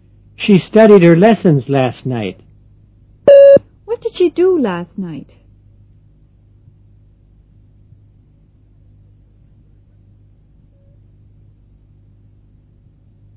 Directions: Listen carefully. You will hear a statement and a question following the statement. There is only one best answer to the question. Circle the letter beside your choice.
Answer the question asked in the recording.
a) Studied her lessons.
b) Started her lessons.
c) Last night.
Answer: a) Studied her lessons.

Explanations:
She studied her lessons last night.

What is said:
5.She studied her lessons last night. What did she do last night? (a)